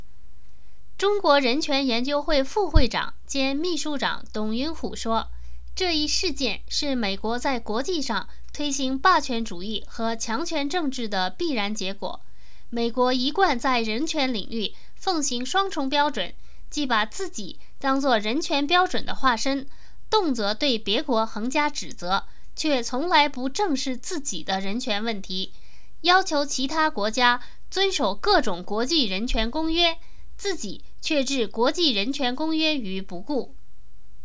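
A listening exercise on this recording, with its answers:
Please answer the following questions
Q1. 中国对伊拉克囚犯受到虐待事件的反应是什么?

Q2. 中国对美国在人权问题上的做法是如何评价的?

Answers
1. 认为这一事件是美国在国际上推行霸权主义和强权政治的必然结果
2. 美国奉行双重标准,动辄指责别国却不正视自己的人权问题,要求别国遵守国际人权公约,自己却置之不顾

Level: 3rd Year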